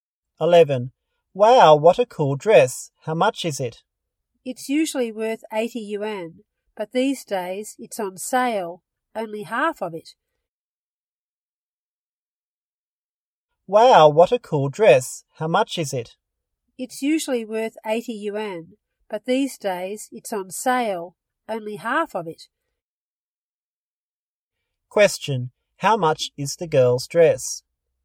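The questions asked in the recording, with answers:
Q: How much is the girl's dress?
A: 40 yuan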